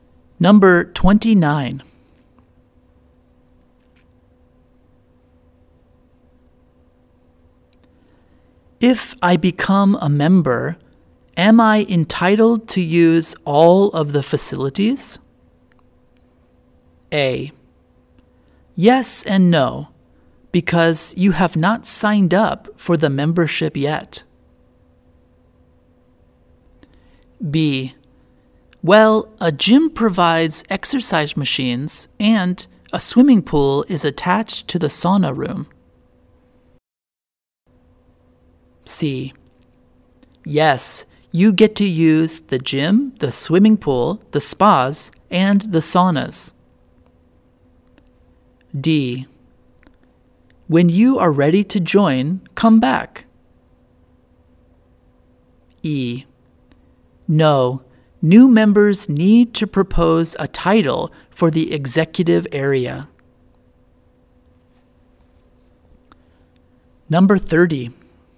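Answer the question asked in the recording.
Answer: C: Yes. You get to use the gym, the swimming pool, the spas, and the saunas.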